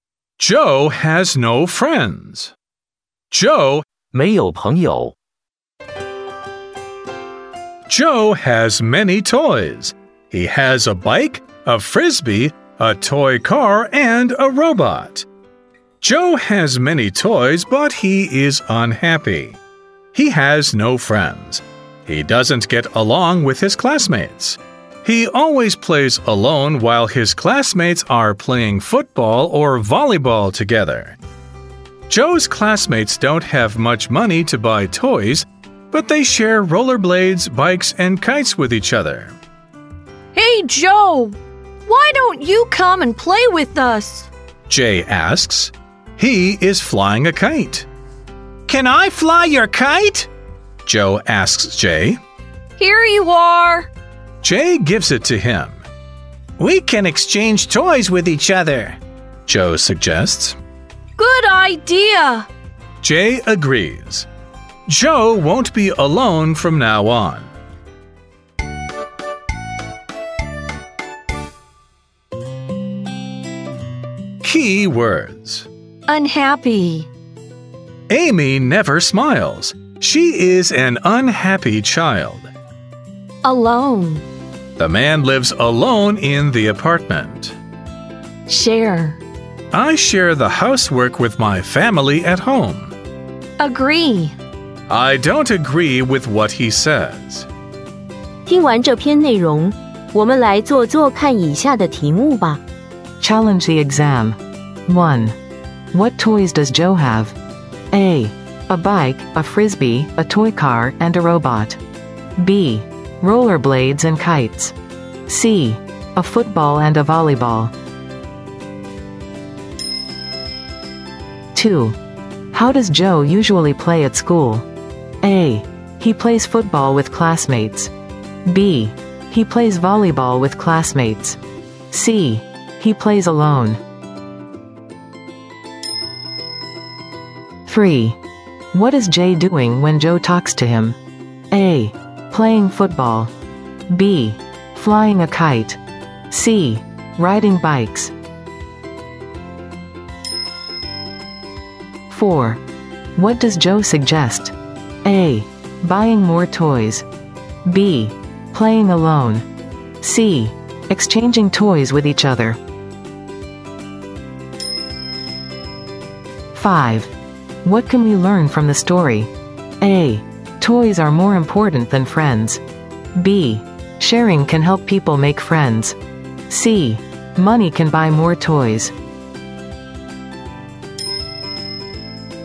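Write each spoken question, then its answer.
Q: What toys does Joe have?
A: A: A bike, a frisbee, a toy car, and a robot.

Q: How does Joe usually play at school?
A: C: He plays alone.

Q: What is Jay doing when Joe talks to him?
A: B: Flying a kite.

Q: What does Joe suggest?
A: C: Exchanging toys with each other.

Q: What can we learn from the story?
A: B: Sharing can help people make friends.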